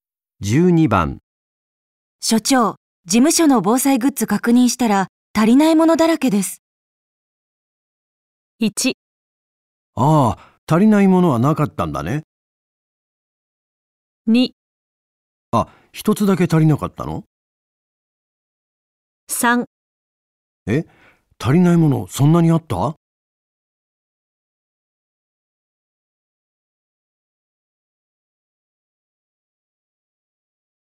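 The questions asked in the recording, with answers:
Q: 所長、事務所の防災グッズ確認したら足りないものだらけです。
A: 3: え、足りないものそんなにあった?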